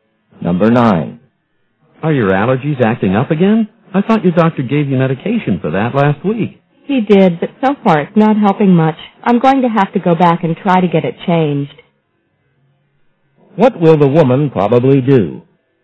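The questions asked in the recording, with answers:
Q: What will the woman probably do?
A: Go back to the doctor to get her medication changed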